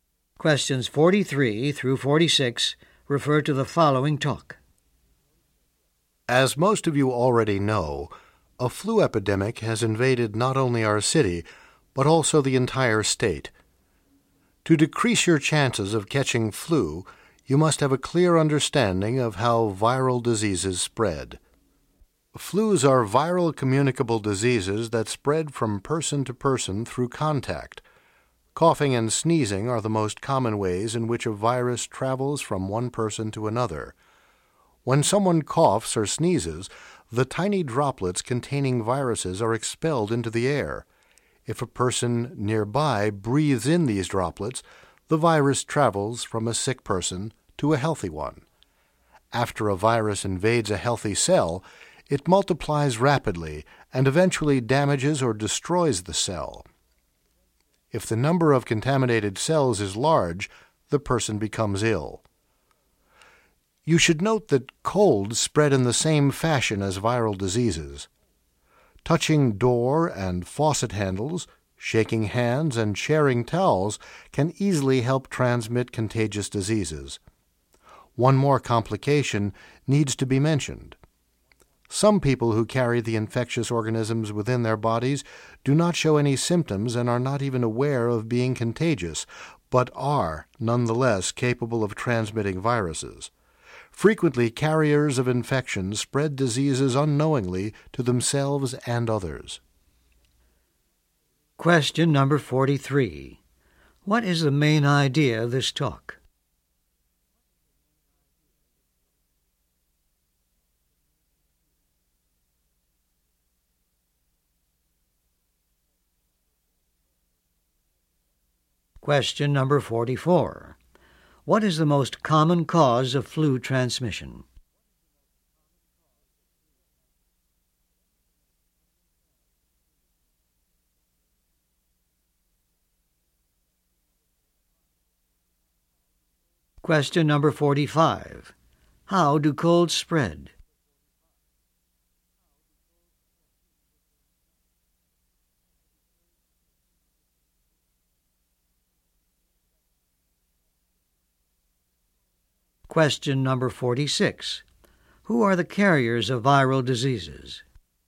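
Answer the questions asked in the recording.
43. How viral diseases like flu spread
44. Coughing and sneezing
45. The same way as viral diseases, through contact
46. People who carry infectious organisms, sometimes without symptoms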